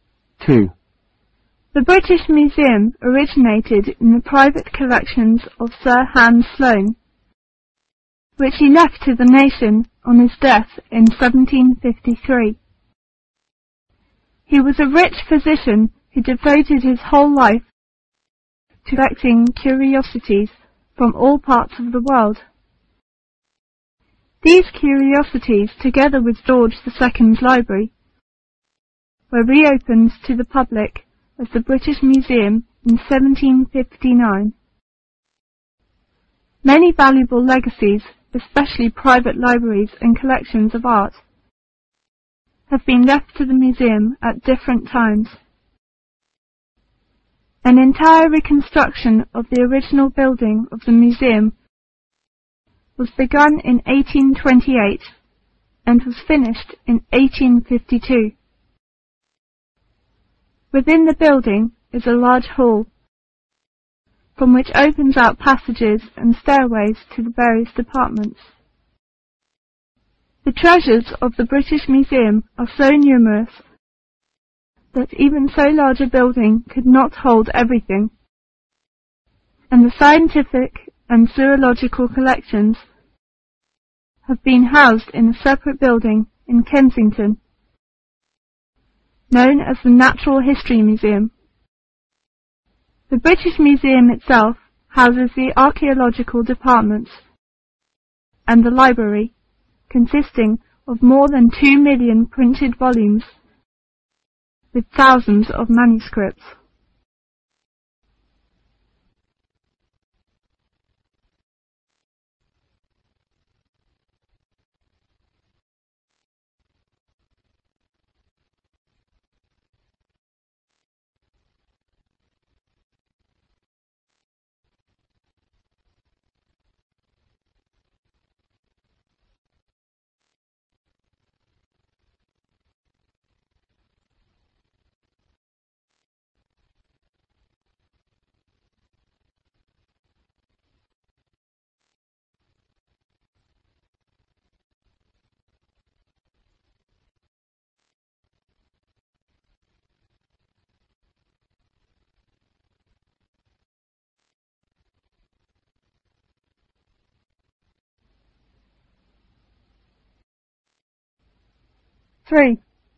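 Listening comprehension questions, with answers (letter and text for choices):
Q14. What is the origin of the British Museum?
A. The private collection of Sir Hans Sloane.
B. The royal library of George.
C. The national library.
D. The national history museum.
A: A. The private collection of Sir Hans Sloane.

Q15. When was it opened to the public?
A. in1753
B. in1759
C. in1828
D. in1852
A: B. in1759

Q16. Where are the scientific and zoological collections?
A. in the British Museum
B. in the library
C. in the house of Sir Hans Sloane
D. in the National History Museum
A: D. in the National History Museum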